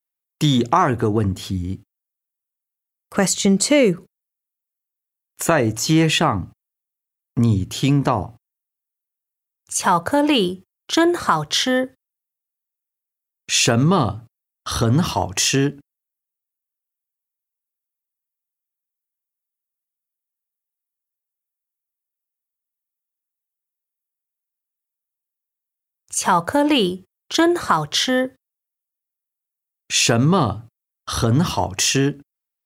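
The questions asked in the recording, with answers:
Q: 什么很好吃?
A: 巧克力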